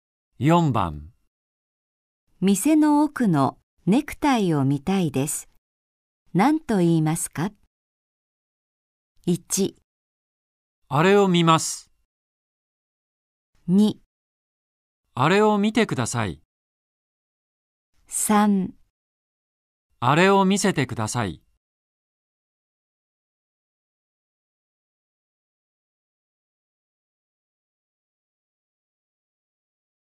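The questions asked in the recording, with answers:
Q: 店の奥のネクタイを見たいです。何と言いますか?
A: 3: あれを見せてください。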